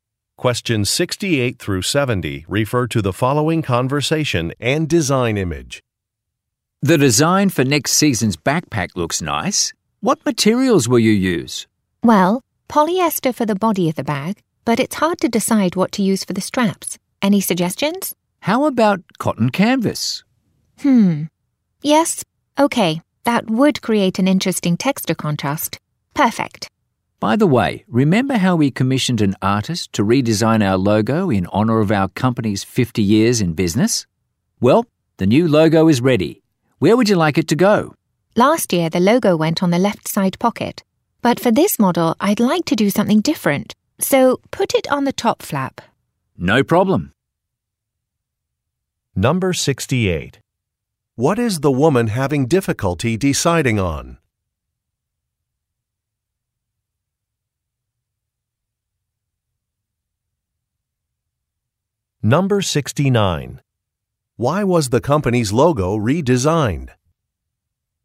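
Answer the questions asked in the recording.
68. What material to use for the backpack straps
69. To celebrate the company's 50 years in business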